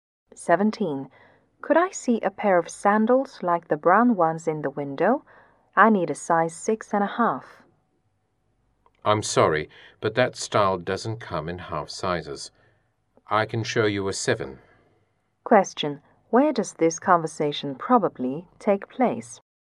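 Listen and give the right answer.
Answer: In a shoe store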